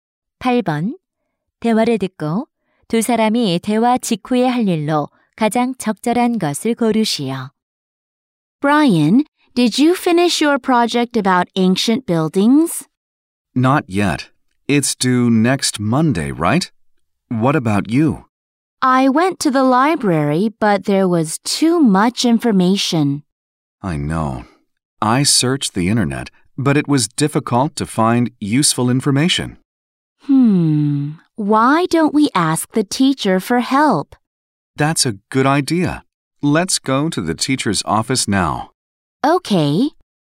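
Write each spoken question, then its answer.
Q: 대화를 듣고 두 사람이 대화 직후에 할 일로 가장 적절한 것을 고르시오.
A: 교무실에 가서 선생님께 도움 요청하기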